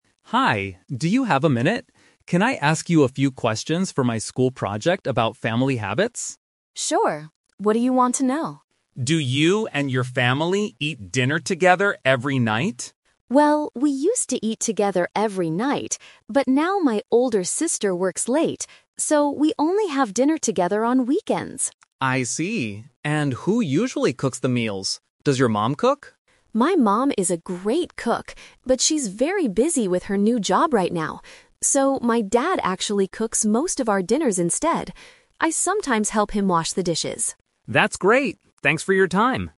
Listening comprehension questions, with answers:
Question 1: When does the student's family eat dinner together?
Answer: On weekends.

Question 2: Why doesn't the family eat together every night?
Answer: Because the sister works late.

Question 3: Who usually cooks dinner for the family now?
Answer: The father.

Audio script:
Interviewer: Hi, do you have a minute? Can I ask you a few questions for my school project about family habits?
Student: Sure! What do you want to know?
Interviewer: Do you and your family eat dinner together every night?
Student: Well, we used to eat together every night, but now my older sister works late. So, we only have dinner together on weekends.
Interviewer: I see. And who usually cooks the meals? Does your mom cook?
Student: My mom is a great cook, but she's very busy with her new job right now. So, my dad actually cooks most of our dinners instead. I sometimes help him wash the dishes.